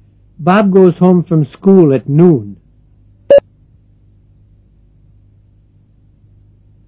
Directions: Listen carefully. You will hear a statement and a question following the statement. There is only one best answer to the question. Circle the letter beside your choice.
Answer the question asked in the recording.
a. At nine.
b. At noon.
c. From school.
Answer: b. At noon.

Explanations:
Bob goes home from school at noon.